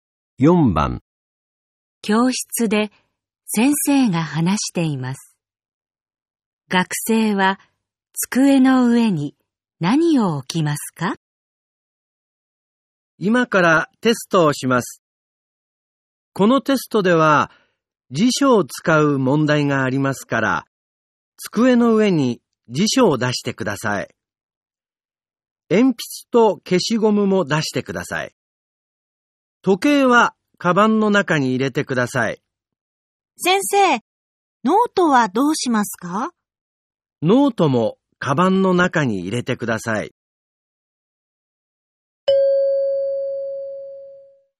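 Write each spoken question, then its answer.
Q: 学生は机の上に何を置きますか?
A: 辞書と鉛筆と消しゴム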